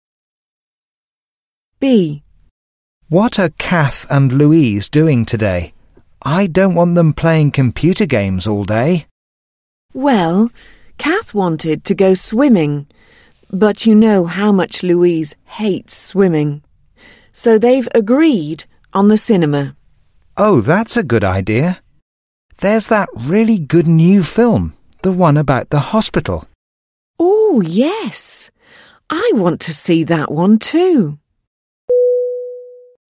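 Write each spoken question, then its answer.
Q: What are Kath and Louise doing today?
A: Going to the cinema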